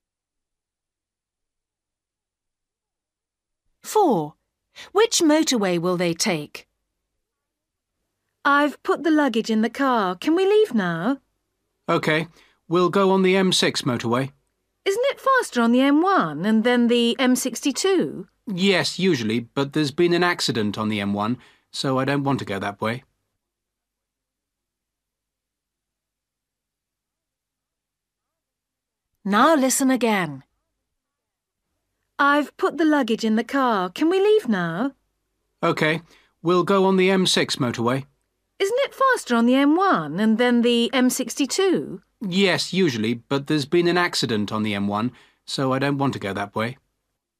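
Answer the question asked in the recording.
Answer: The M6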